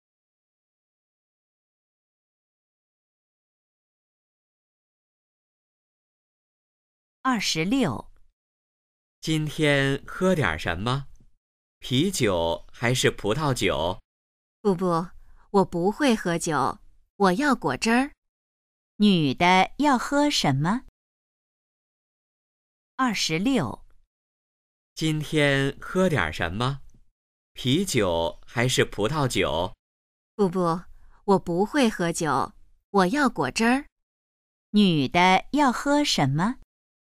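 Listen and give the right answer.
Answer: 果汁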